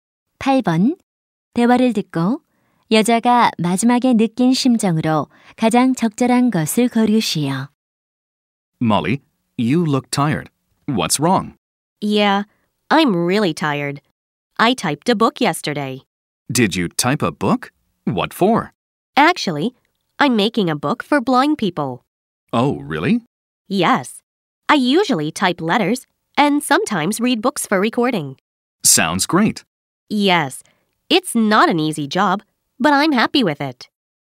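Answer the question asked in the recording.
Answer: 행복함, 뿌듯함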